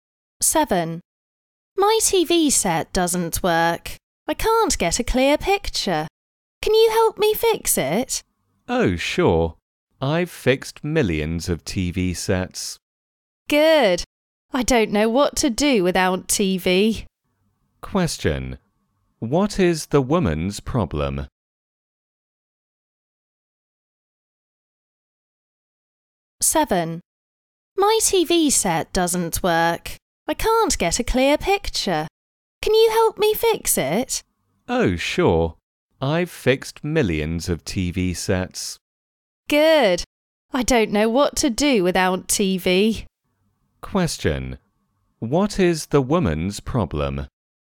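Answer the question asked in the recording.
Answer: Her TV set doesn't work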